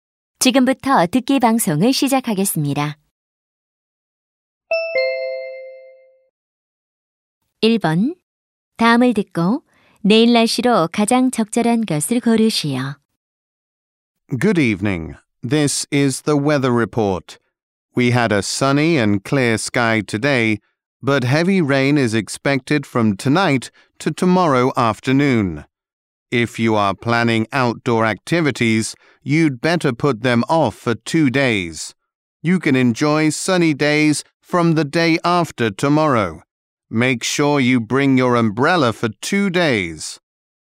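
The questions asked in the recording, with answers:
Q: 다음을 듣고 내일 날씨로 가장 적절한 것을 고르시오.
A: 비가 많이 옴 (오후까지 폭우)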